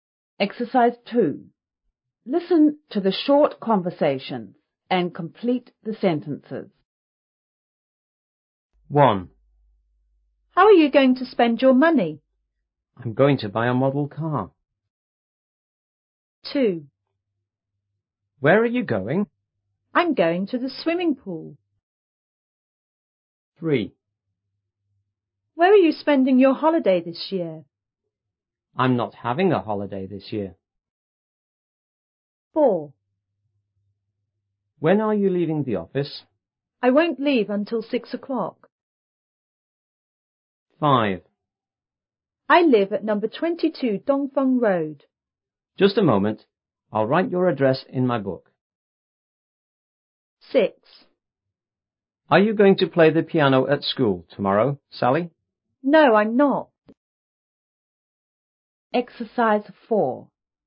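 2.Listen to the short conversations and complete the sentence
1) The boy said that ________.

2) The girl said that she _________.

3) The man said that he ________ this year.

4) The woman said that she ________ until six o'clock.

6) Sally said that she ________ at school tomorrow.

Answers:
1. he was going to buy a model car
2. was going to the swimming pool
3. wasn't having a holiday
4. wouldn't leave
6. wasn't going to play the piano

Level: 5B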